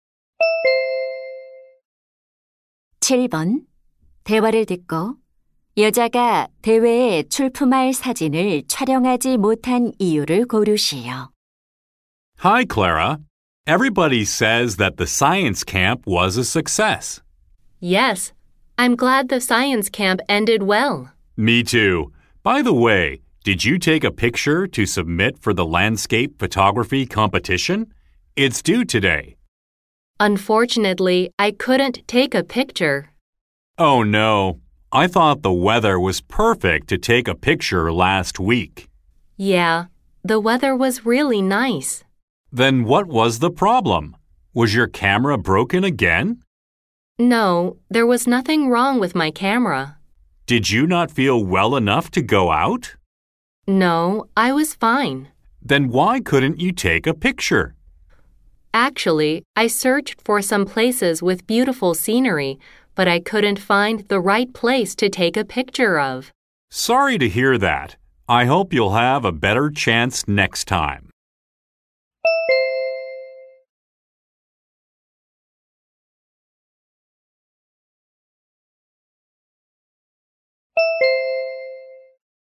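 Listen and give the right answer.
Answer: 사진 찍기에 적절한 장소를 찾지 못해서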